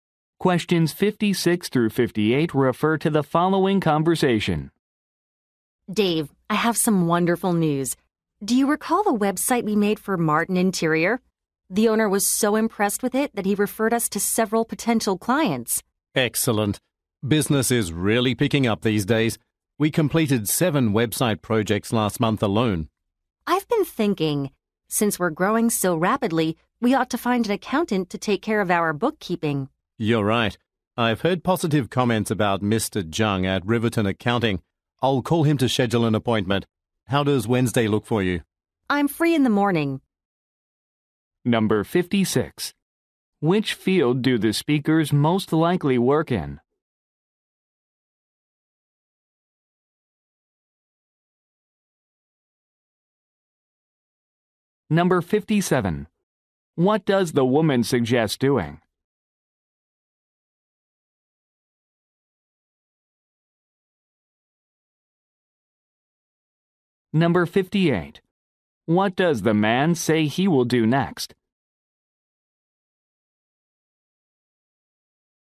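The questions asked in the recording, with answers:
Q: Which field do the speakers most likely work in?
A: Website design

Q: What does the woman suggest doing?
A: Hiring an accountant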